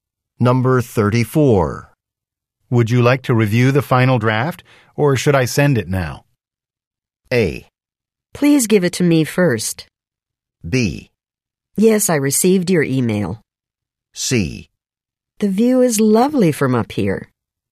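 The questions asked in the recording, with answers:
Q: Would you like to review the final draft, or should I send it now?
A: A: Please give it to me first.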